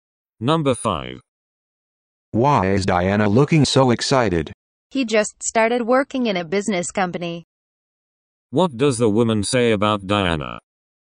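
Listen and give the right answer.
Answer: Diana just started working at a business company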